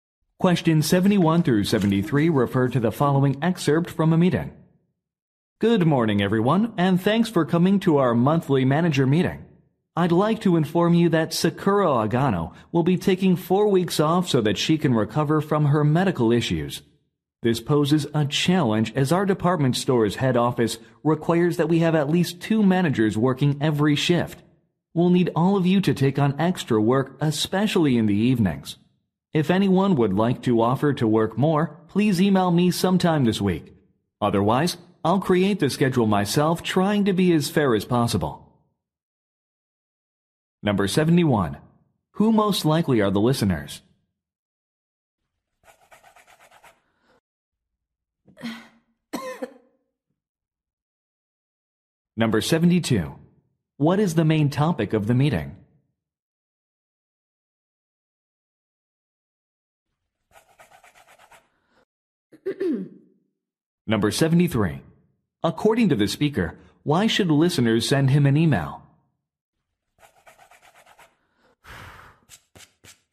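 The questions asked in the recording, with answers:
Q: Who most likely are the listeners?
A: Department store managers

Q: What is the main topic of the meeting?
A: A manager's leave and the staffing/schedule needs

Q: According to the speaker, why should listeners send him an email?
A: To volunteer to work extra shifts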